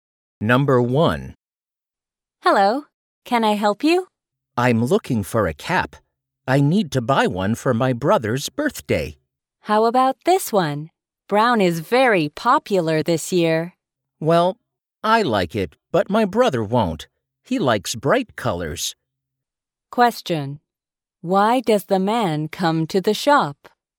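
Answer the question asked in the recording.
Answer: To buy a cap for his brother's birthday.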